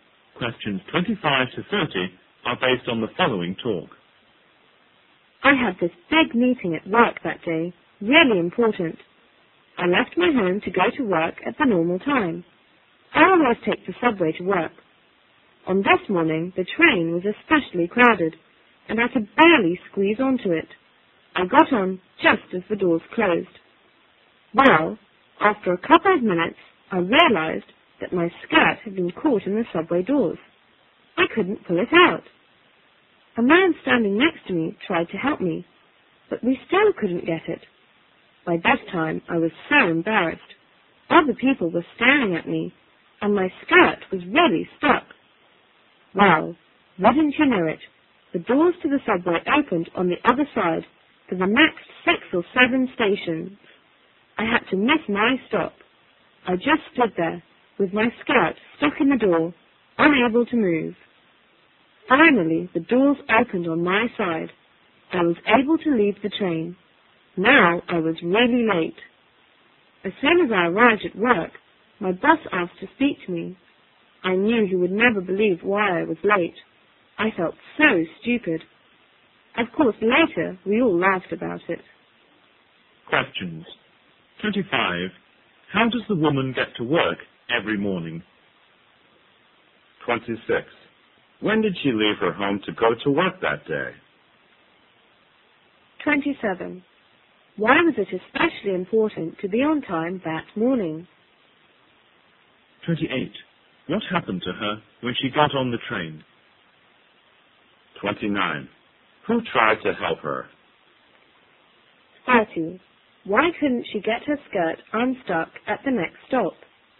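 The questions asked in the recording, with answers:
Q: How does the woman get to work every morning?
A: By subway

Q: When did she leave her home to go to work that day?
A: At the normal time

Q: Why was it especially important to be on time that morning?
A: She had a big, important meeting

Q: What happened to her when she got on the train?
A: Her skirt got caught in the doors

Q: Who tried to help her?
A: A man standing next to her

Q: Why couldn't she get her skirt unstuck at the next stop?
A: The doors opened on the other side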